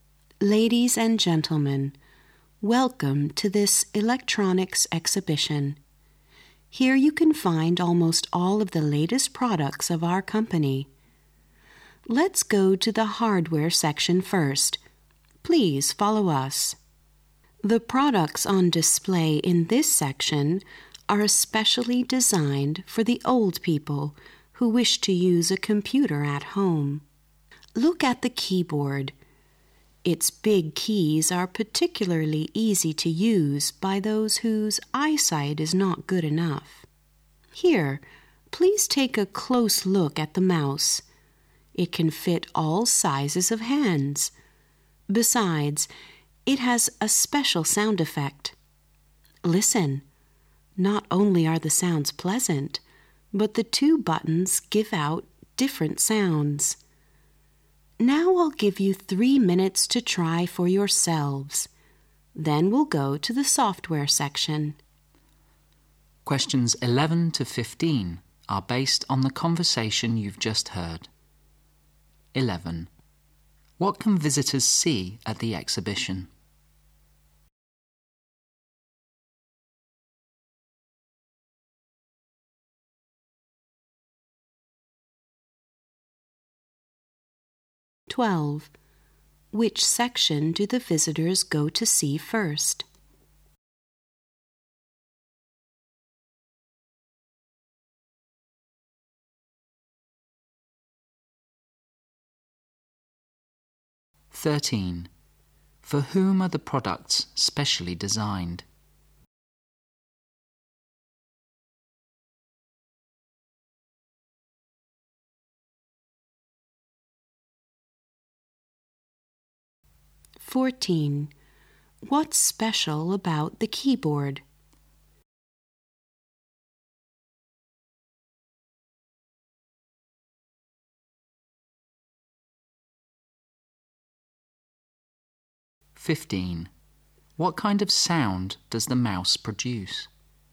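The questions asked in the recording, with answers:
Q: What can visitors see at the exhibition?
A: The company's latest electronic products

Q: Which section do the visitors go to see first?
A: The hardware section

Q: For whom are the products specially designed?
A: Old people

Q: What's special about the keyboard?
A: Its big keys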